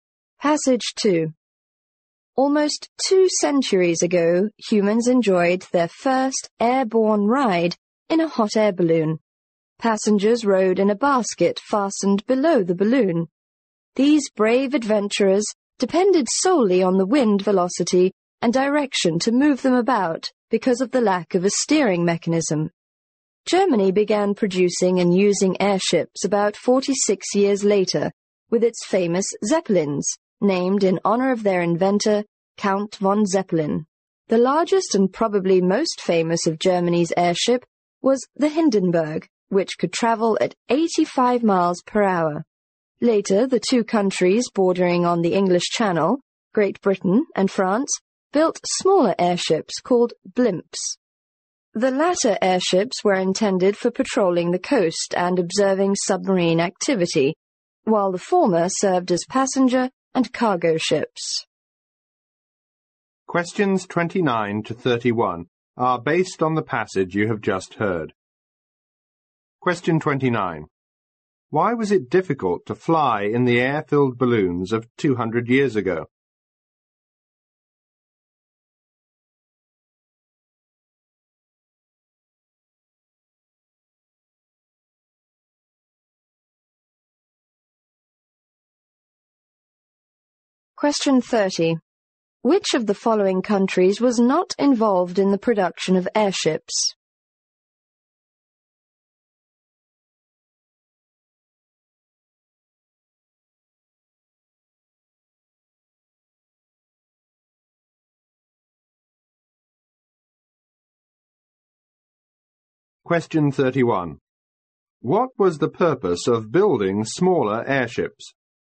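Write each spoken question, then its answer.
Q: Why was it difficult to fly in the air-filled balloons of 200 years ago?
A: There was no steering mechanism.

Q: What was the purpose of building smaller airships?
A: Patrolling the coast and observing submarine activity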